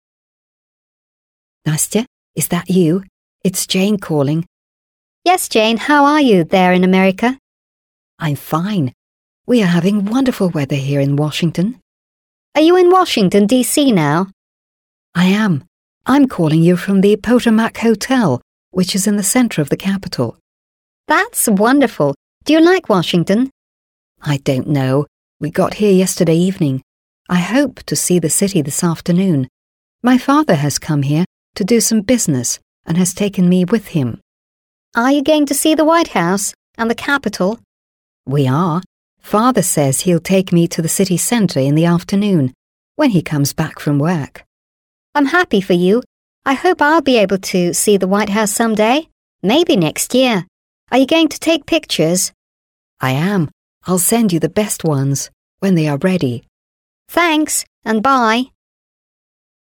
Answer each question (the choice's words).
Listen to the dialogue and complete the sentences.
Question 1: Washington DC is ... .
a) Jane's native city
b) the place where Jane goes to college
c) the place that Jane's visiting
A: the place that Jane's visiting

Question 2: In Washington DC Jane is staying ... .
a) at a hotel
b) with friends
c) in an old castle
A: at a hotel

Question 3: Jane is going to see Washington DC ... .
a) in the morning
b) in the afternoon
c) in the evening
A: in the afternoon

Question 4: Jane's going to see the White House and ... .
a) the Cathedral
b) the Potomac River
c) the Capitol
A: the Capitol

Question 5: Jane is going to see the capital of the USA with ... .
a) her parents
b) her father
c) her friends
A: her father

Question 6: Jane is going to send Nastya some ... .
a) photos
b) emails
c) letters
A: photos

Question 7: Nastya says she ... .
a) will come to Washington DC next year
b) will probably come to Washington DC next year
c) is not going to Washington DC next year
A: will probably come to Washington DC next year

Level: 7 класс